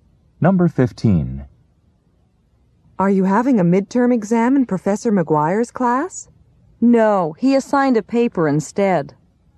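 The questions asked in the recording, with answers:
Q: What did Professor McGuire do?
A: Assigned a paper instead of a midterm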